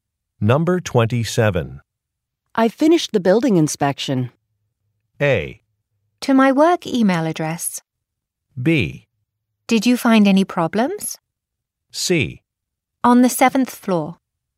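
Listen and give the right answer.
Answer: B: Did you find any problems?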